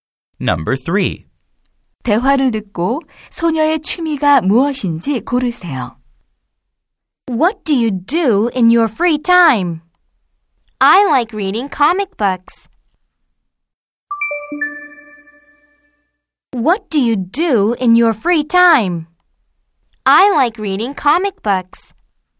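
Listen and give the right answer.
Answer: 만화책 읽기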